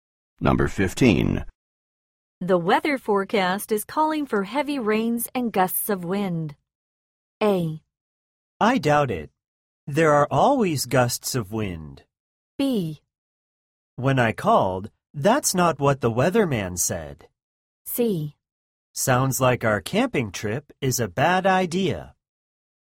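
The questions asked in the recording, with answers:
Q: The weather forecast is calling for heavy rains and gusts of wind.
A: C: Sounds like our camping trip is a bad idea.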